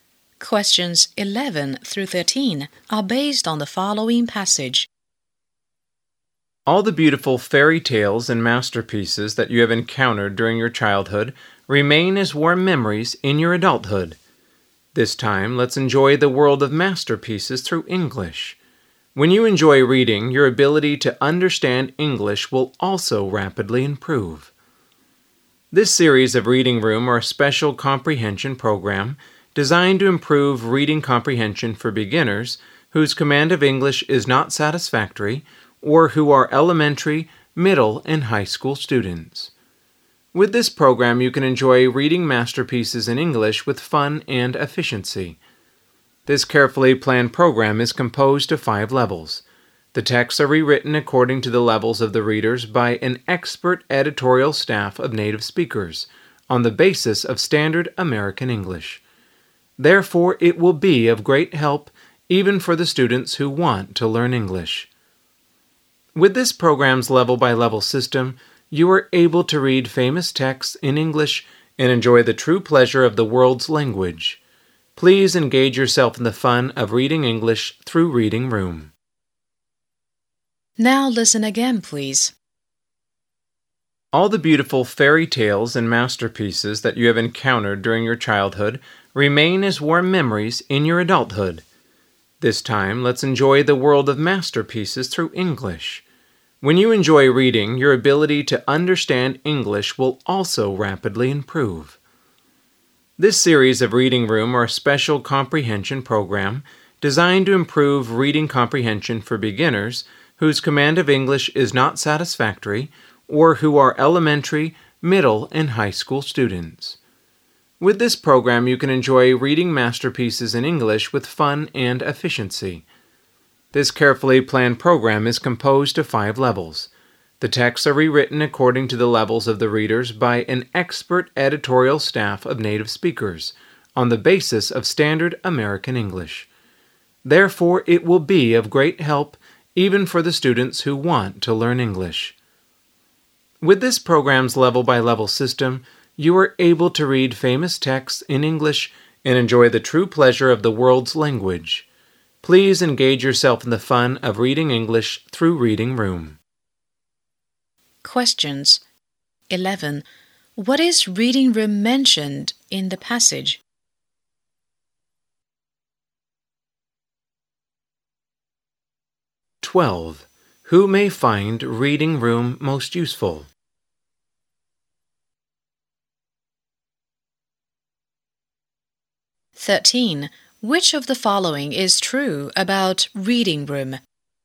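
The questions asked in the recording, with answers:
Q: What is Reading Room mentioned in the passage?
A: A reading comprehension program for learning English through masterpieces

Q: Who may find Reading Room most useful?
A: Beginners and students whose English is not satisfactory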